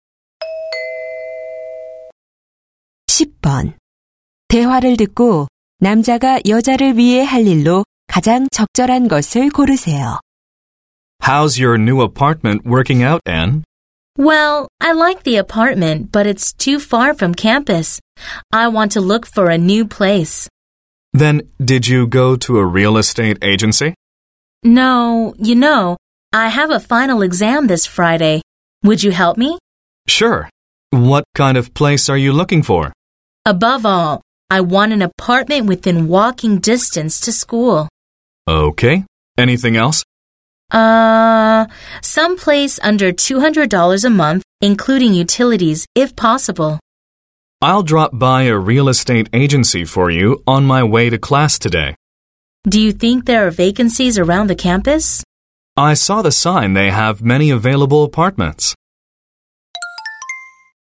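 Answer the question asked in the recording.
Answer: 부동산 중개소에 들러 아파트 알아보기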